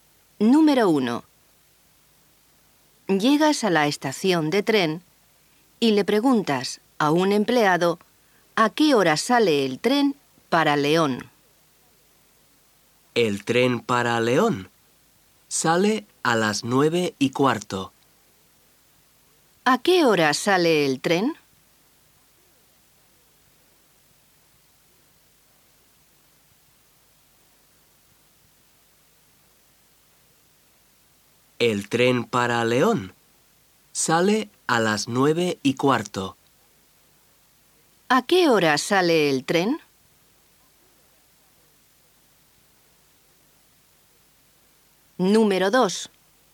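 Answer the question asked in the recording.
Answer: A las 9:15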